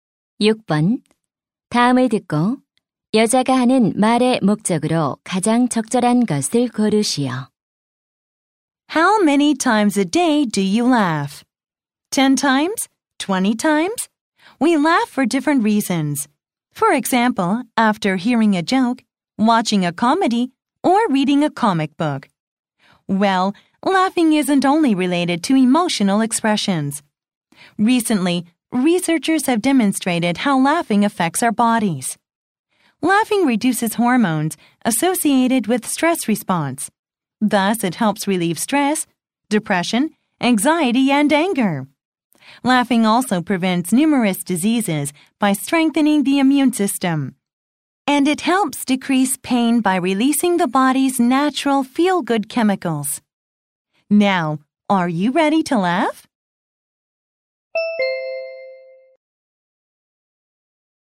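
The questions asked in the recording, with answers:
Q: 다음을 듣고 여자가 하는 말의 목적으로 가장 적절한 것을 고르시오.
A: 웃음이 몸과 건강에 주는 이점을 알리려고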